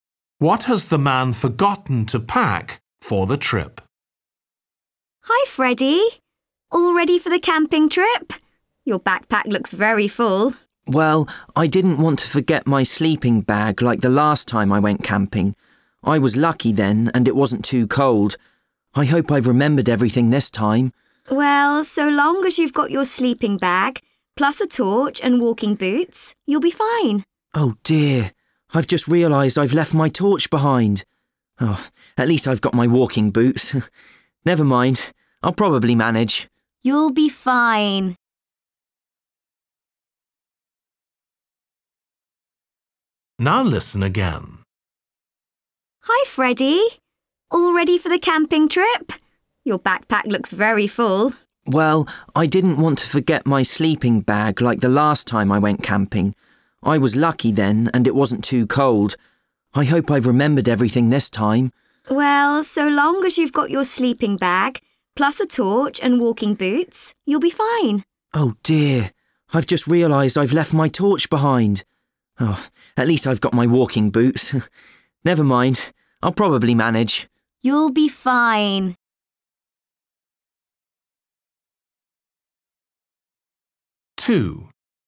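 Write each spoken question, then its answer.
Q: What has the man forgotten to pack for the trip?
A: his torch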